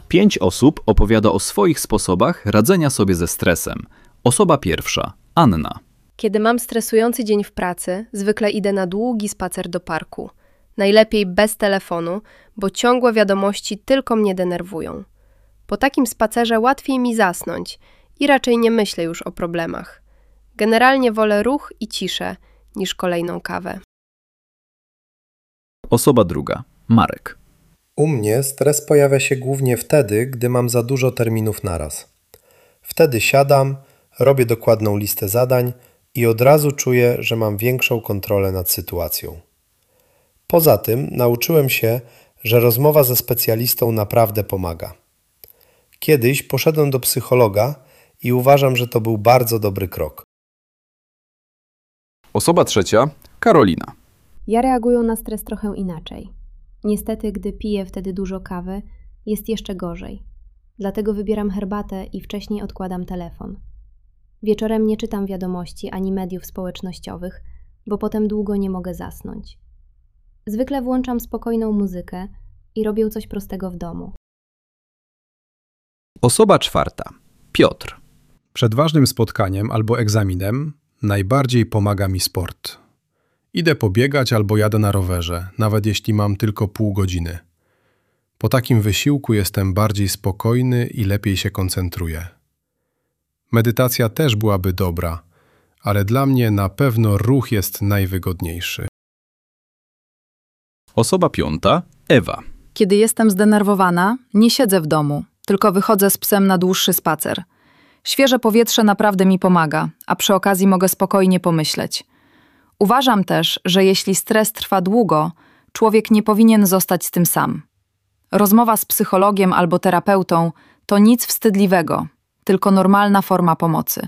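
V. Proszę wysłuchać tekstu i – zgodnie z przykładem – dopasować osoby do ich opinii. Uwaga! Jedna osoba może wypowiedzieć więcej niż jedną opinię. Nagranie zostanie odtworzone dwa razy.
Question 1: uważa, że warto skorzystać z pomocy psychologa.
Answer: Marek, Ewa

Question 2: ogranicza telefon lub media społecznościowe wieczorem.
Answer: Anna, Karolina

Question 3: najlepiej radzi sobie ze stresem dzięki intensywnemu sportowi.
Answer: Piotr

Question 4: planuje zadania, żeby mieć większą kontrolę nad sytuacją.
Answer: Marek

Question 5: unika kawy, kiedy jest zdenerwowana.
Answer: Karolina

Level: B1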